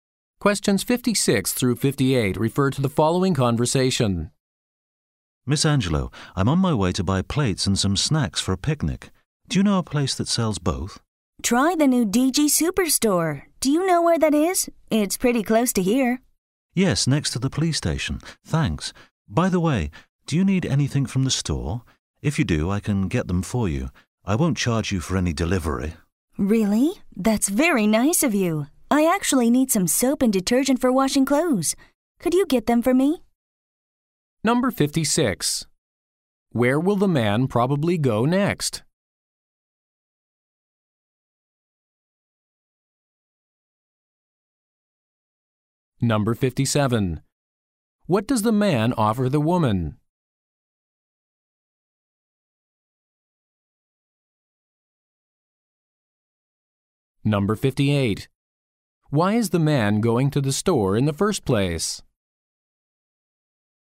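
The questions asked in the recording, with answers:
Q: Where will the man probably go next?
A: The DG Superstore

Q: What does the man offer the woman?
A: To buy things for her at no delivery charge

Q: Why is the man going to the store in the first place?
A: To buy plates and snacks for a picnic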